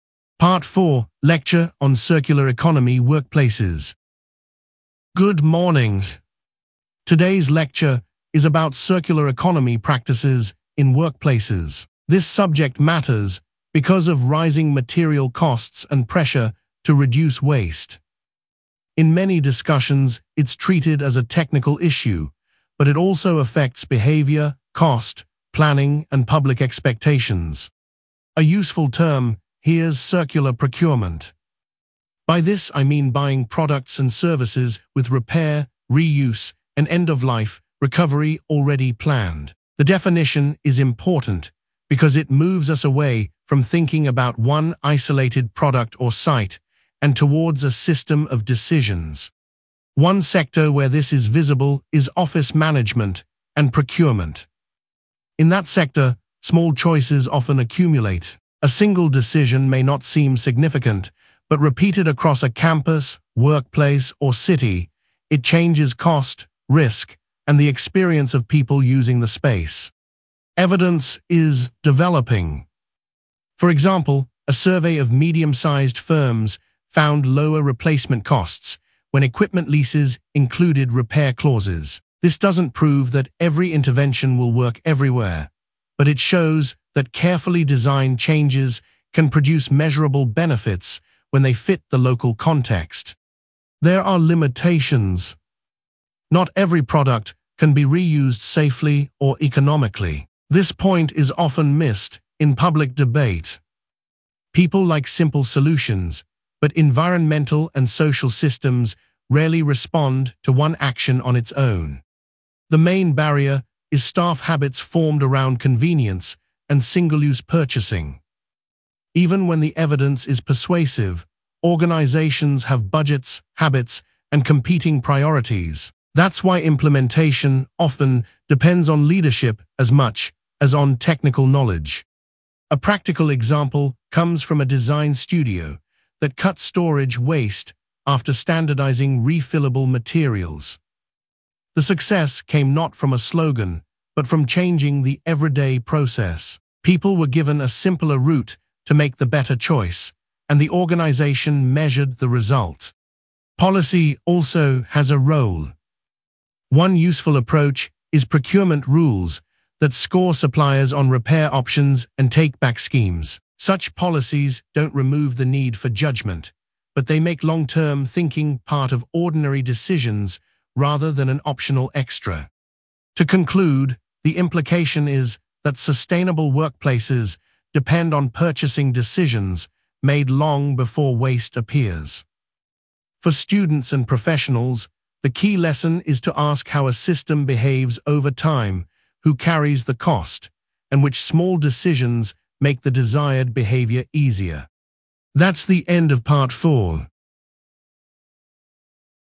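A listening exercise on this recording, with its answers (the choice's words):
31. What is the main topic of the lecture?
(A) circular economy practices in workplaces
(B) the history of public libraries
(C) language change in childhood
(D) international trade law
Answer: circular economy practices in workplaces

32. What primary cause or pressure does the lecturer mention?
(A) a fall in student numbers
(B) the cost of museum tickets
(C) rising material costs and pressure to reduce waste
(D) a lack of sports facilities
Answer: rising material costs and pressure to reduce waste

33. Which sector is used as an example?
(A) fashion retail only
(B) office management and procurement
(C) restaurant advertising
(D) private music tuition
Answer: office management and procurement

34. What does the term circular procurement mean?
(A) a short-term publicity campaign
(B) a law that bans all development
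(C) a list of personal preferences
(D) buying products and services with repair, reuse, and end-of-life recovery already planned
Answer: buying products and services with repair, reuse, and end-of-life recovery already planned

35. What did the study or survey find?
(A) a survey of medium-sized firms found lower replacement costs when equipment leases included repair clauses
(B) no measurable result at all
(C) results only in one classroom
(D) a rise in international flights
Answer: a survey of medium-sized firms found lower replacement costs when equipment leases included repair clauses

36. What limitation does the lecturer mention?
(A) the topic has never been studied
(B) all users reject the idea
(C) not every product can be reused safely or economically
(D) it applies only to children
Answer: not every product can be reused safely or economically

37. What is identified as the main barrier?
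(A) lack of weather data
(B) staff habits formed around convenience and single-use purchasing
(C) too many volunteers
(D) excessive classroom space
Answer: staff habits formed around convenience and single-use purchasing

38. What practical example does the lecturer give?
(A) a school closing its library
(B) a cafe increasing plastic packaging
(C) a hospital cancelling training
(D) a design studio that cut storage waste after standardising refillable materials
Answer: a design studio that cut storage waste after standardising refillable materials

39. What policy approach is mentioned?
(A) procurement rules that score suppliers on repair options and take-back schemes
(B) removing all inspection rules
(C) allowing only voluntary action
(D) banning student research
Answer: procurement rules that score suppliers on repair options and take-back schemes

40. What is the overall implication?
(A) short-term savings matter most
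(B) technology can replace all staff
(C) sustainable workplaces depend on purchasing decisions made long before waste appears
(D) individual habits are irrelevant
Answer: sustainable workplaces depend on purchasing decisions made long before waste appears

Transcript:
Part 4: Lecture on Circular Economy Workplaces
Lecturer: Good morning. Today's lecture is about circular economy practices in workplaces. This subject matters because of rising material costs and pressure to reduce waste. In many discussions it is treated as a technical issue, but it also affects behaviour, cost, planning, and public expectations.
Lecturer: A useful term here is circular procurement. By this I mean buying products and services with repair, reuse, and end-of-life recovery already planned. The definition is important because it moves us away from thinking about one isolated product or site and towards a system of decisions.
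Lecturer: One sector where this is visible is office management and procurement. In that sector, small choices often accumulate. A single decision may not seem significant, but repeated across a campus, workplace, or city, it changes cost, risk, and the experience of people using the space.
Lecturer: Evidence is developing. For example, a survey of medium-sized firms found lower replacement costs when equipment leases included repair clauses. This does not prove that every intervention will work everywhere, but it shows that carefully designed changes can produce measurable benefits when they fit the local context.
Lecturer: There are limitations. This point is often missed in public debate. People like simple solutions, but environmental and social systems rarely respond to one action on its own.
Lecturer: The main barrier is staff habits formed around convenience and single-use purchasing. 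Even when the evidence is persuasive, organisations have budgets, habits, and competing priorities. That is why implementation often depends on leadership as much as on technical knowledge.
Lecturer: A practical example comes from a design studio that cut storage waste after standardising refillable materials. The success came not from a slogan, but from changing the everyday process. People were given a simpler route to make the better choice, and the organisation measured the result.
Lecturer: Policy also has a role. One useful approach is procurement rules that score suppliers on repair options and take-back schemes. Such policies do not remove the need for judgement, but they make long-term thinking part of ordinary decisions rather than an optional extra.
Lecturer: To conclude, the implication is that sustainable workplaces depend on purchasing decisions made long before waste appears. 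For students and professionals, the key lesson is to ask how a system behaves over time, who carries the cost, and which small decisions make the desired behaviour easier.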